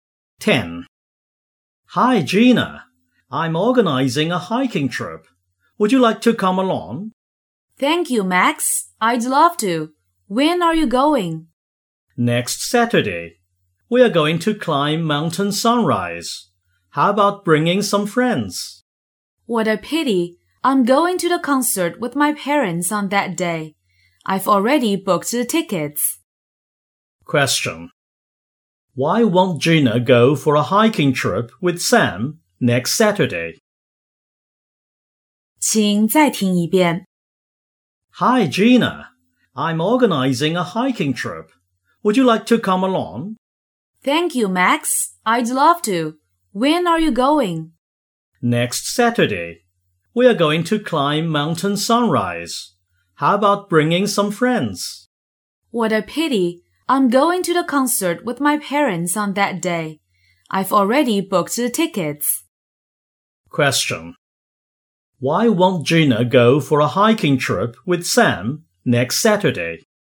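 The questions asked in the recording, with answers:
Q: Why won't Gina go for a hiking trip with Sam next Saturday?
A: She is going to a concert with her parents that day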